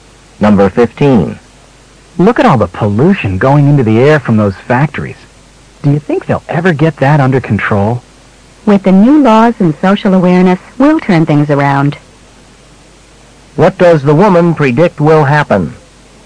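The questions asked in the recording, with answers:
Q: What does the woman predict will happen?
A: Pollution will be brought under control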